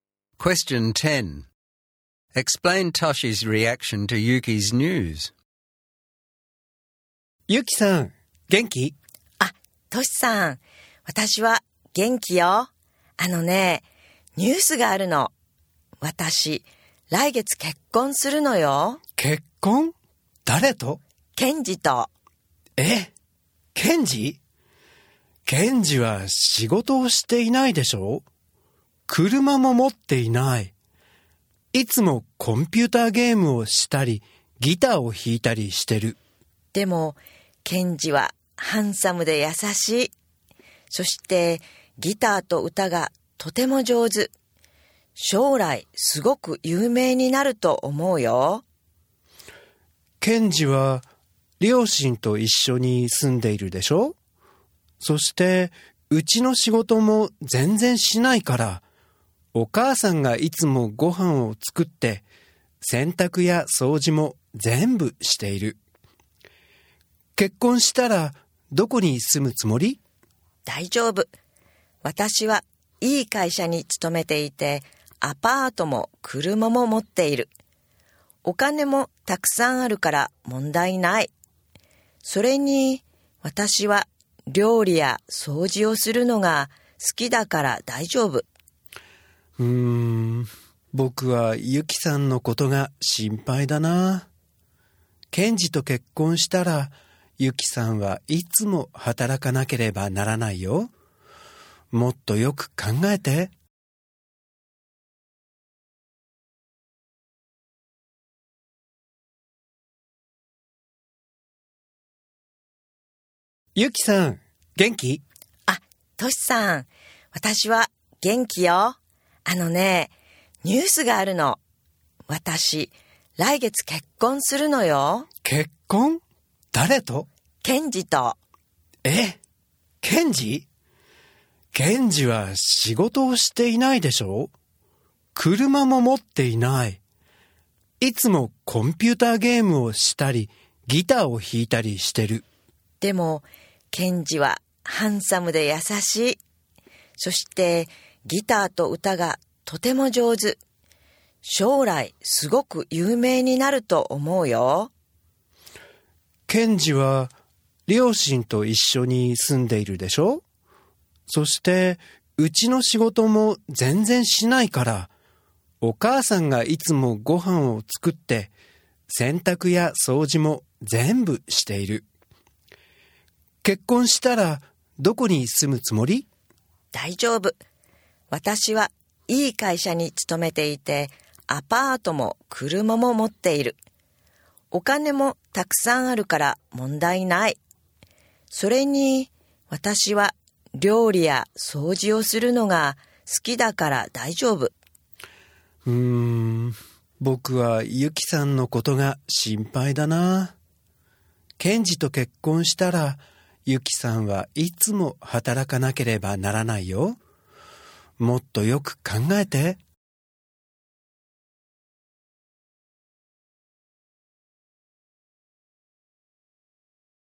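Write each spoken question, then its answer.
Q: Explain Toshi's reaction to Yuki's news.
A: He is worried. Kenji has no job or car and does no housework, so Yuki would always have to work. He tells her to think more carefully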